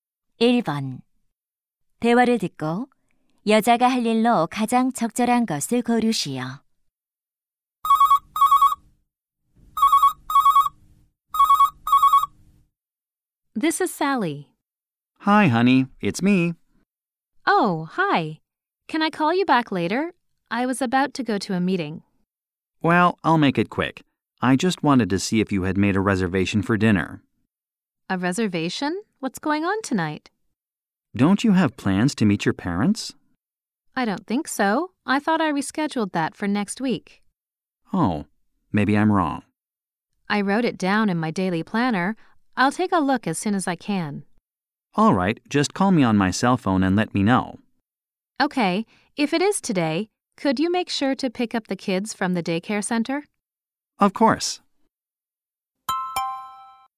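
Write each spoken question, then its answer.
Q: 대화를 듣고 여자가 할 일로 가장 적절한 것을 고르시오.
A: 일정표(다이어리) 확인하기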